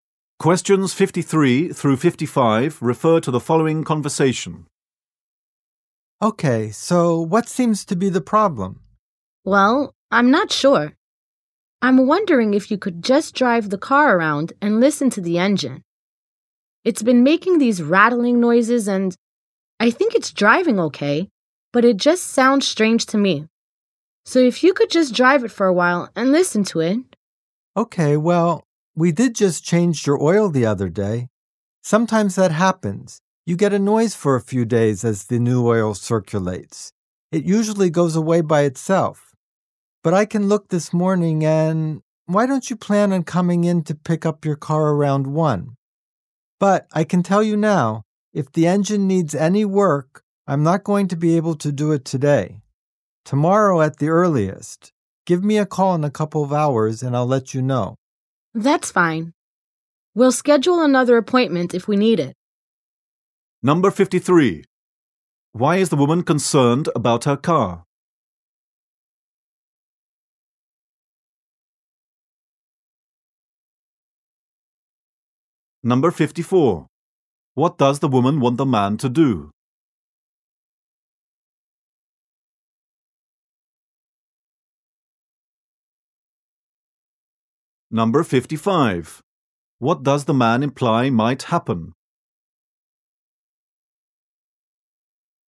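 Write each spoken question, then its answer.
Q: Why is the woman concerned about her car?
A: The engine is making rattling noises.

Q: What does the woman want the man to do?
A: Drive the car and listen to the engine.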